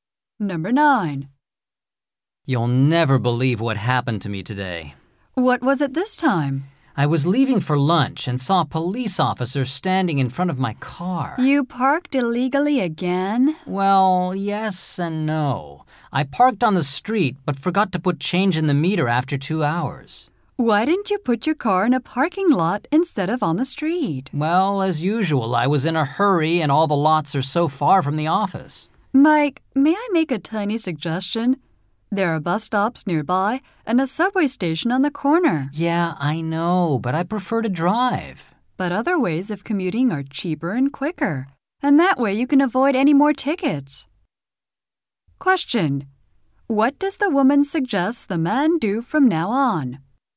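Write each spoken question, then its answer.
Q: What does the woman suggest the man do from now on?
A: Take the bus or subway to work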